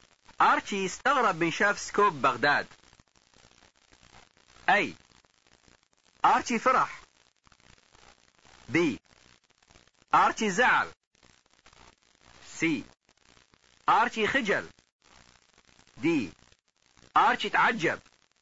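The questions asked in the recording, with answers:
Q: أرتشي استغرب من شاف سكوب بغداد.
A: د: أرتشي تعجب.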